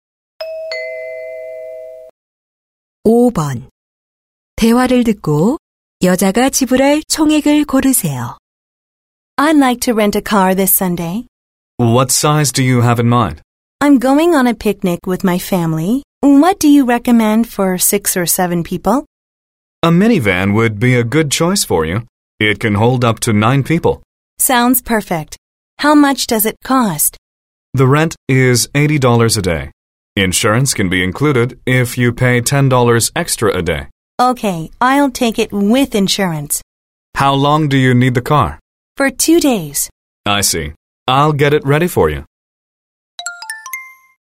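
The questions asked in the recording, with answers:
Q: 대화를 듣고 여자가 지불할 총액을 고르세요.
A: $180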